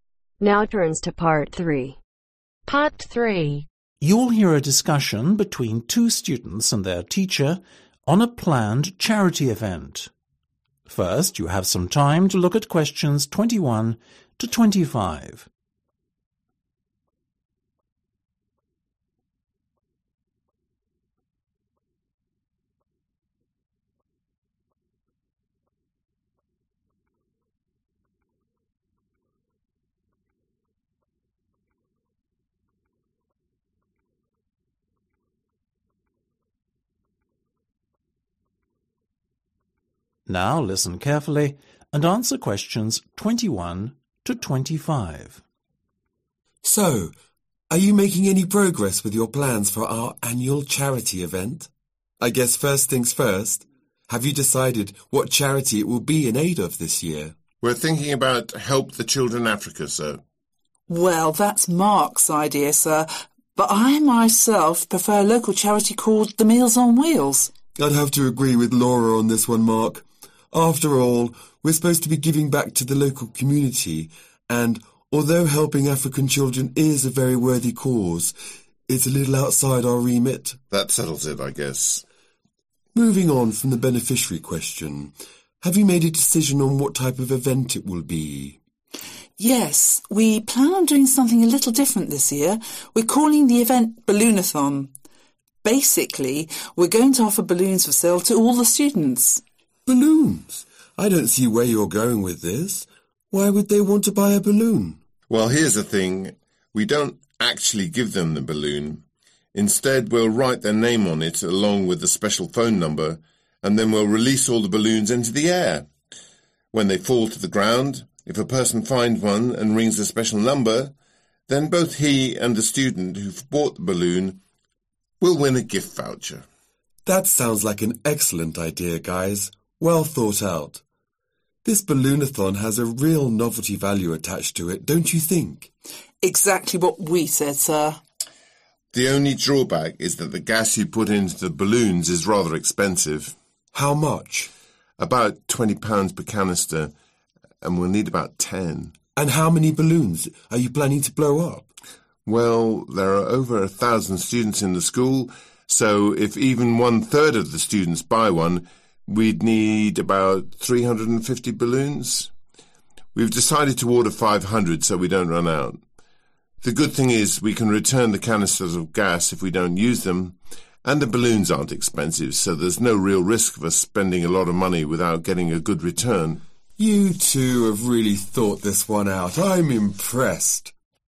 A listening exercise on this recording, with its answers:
Complete the sentences below. Write NO MORE THAN TWOWORDS for each answer.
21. The aim of the project is to raise money to support a (21)............ specifically rather than one that operates abroad.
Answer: Local charity

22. In this year's charity event, students will be offered the chance to buy (22)............ .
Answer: Balloons

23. In order to win a prize, the finder will have to ring the (23)............ .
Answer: Special Number

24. The fact that each gas (24)............ costs $20, is the only drawback.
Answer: Canister

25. The students think it is best to put in an order of 500 (25)............ to make sure that they don't run out of them.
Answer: Balloons